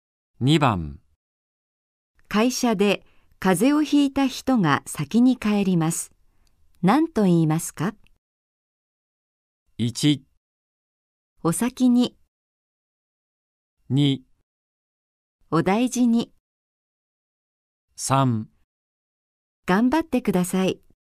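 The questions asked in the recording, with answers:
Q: 会社で風邪をひいた人が先に帰ります。何と言いますか?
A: 2: お大事に。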